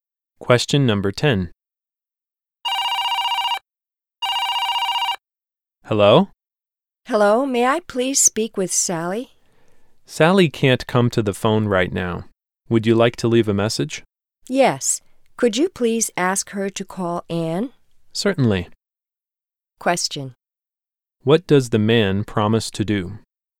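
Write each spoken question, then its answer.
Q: What does the man promise to do?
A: Ask Sally to call Anne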